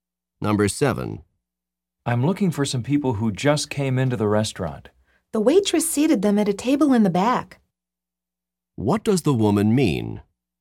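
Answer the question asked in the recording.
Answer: The people are sitting at a table in the back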